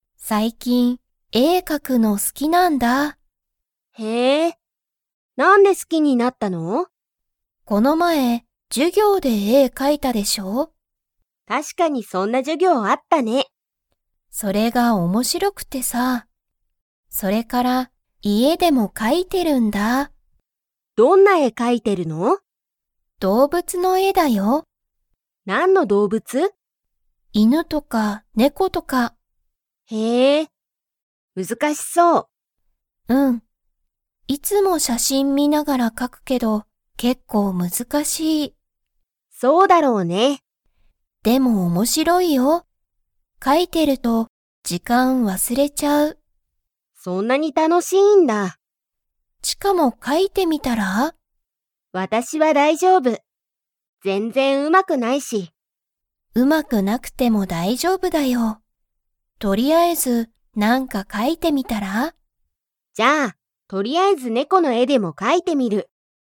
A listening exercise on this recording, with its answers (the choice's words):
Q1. エミは、この前まえ で絵えを描かいた。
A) 授業じゅぎょう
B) 仕事しごと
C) 外そと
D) お店みせ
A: 授業じゅぎょう

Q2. チカも絵えを描かいてみますか?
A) はい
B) いいえ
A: はい

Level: Level 3